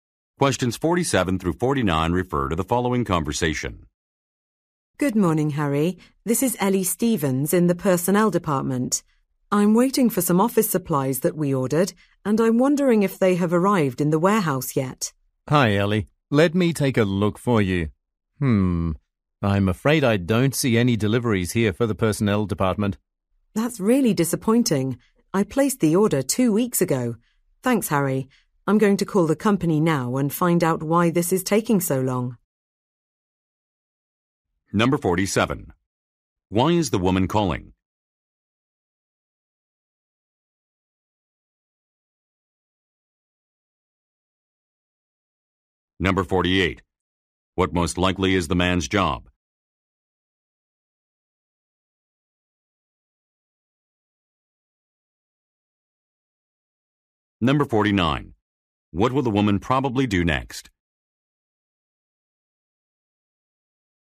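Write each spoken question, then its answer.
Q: Why is the woman calling?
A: To check whether ordered office supplies have arrived

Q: What most likely is the man's job?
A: Warehouse worker

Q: What will the woman probably do next?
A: Call the supply company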